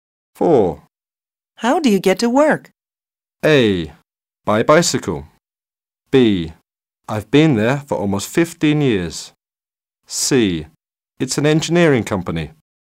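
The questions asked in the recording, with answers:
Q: How do you get to work?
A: A: By bicycle.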